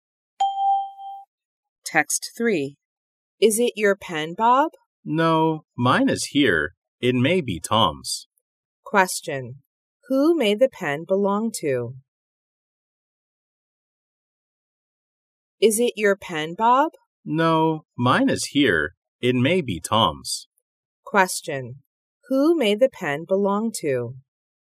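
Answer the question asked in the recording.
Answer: Tom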